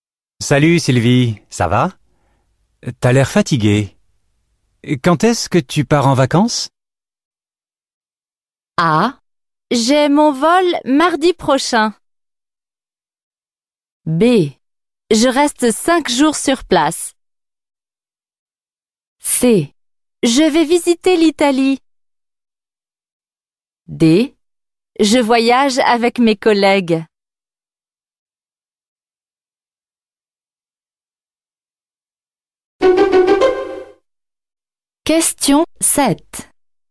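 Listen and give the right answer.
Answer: J'ai mon vol mardi prochain.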